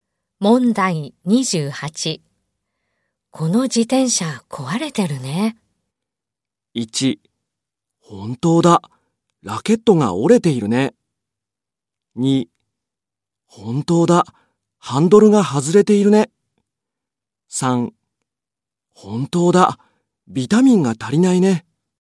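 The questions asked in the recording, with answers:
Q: この自転車壊れてるね。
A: 2: 本当だ。ハンドルが外れているね。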